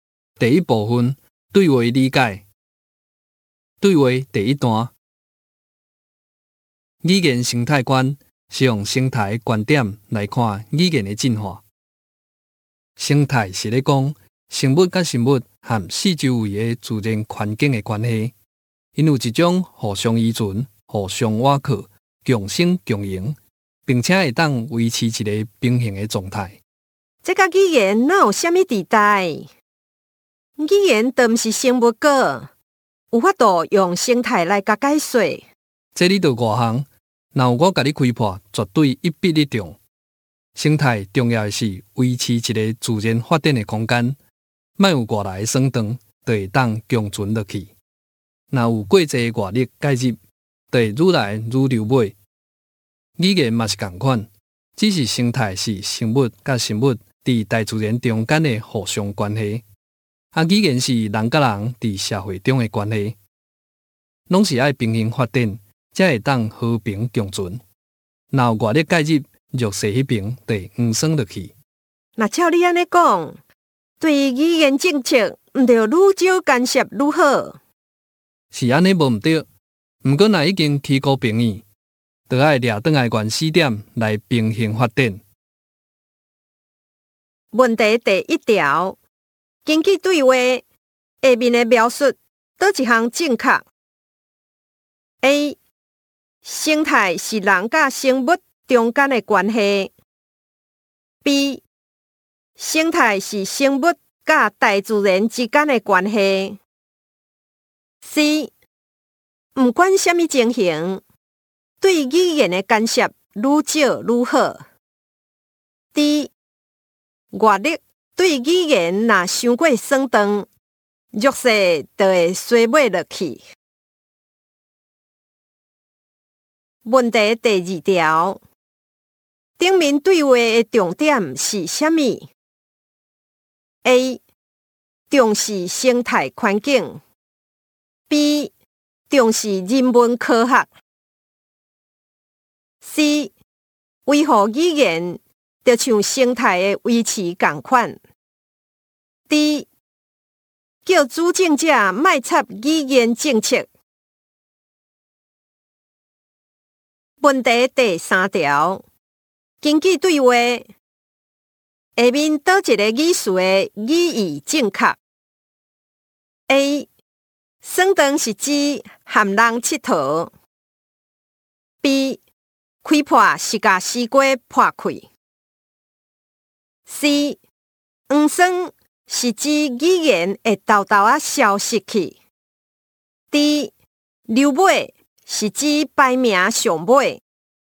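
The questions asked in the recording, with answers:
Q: 根据对话下面的描述,哪一项正确 ?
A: D: 外力对语言若伤过酸长,弱势就会衰败落去

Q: 顶面对话的重点是啥物 ?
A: C: 维护语言,就像生态的维持共款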